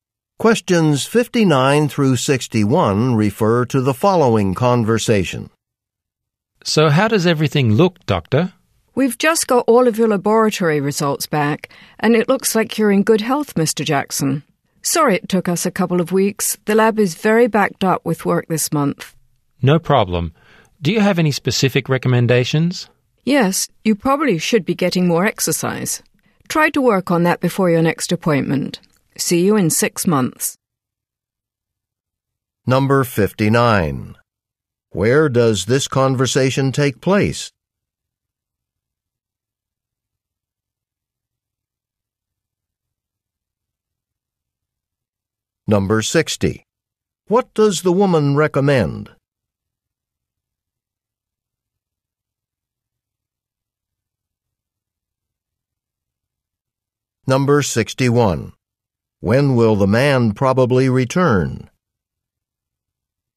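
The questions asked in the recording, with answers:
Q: Where does this conversation take place?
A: At a doctor's office

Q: What does the woman recommend?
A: Getting more exercise

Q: When will the man probably return?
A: In 6 months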